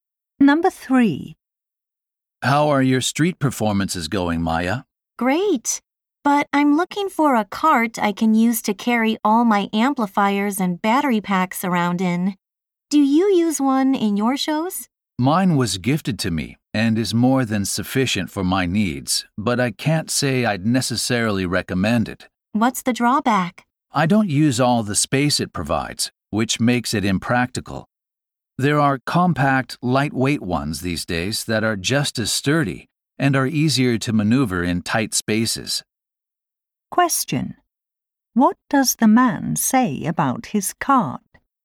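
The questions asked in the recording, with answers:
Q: What does the man say about his cart?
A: It is bigger than he needs.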